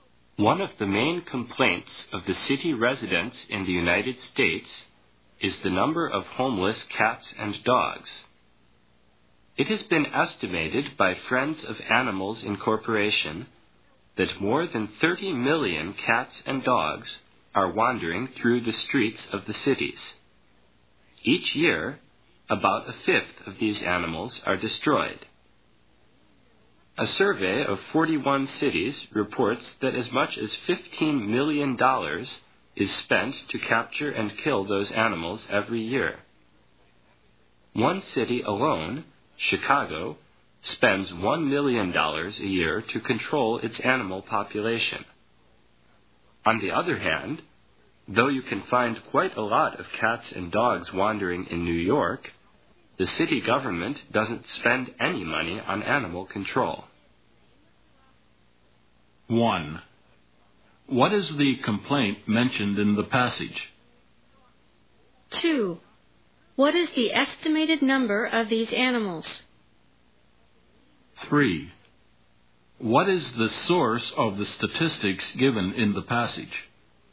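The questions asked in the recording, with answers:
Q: What is the complaint mentioned in the passage?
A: The number of homeless cats and dogs in cities

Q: What is the estimated number of these animals?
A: More than 30 million

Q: What is the source of the statistics given in the passage?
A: Friends of Animals Incorporation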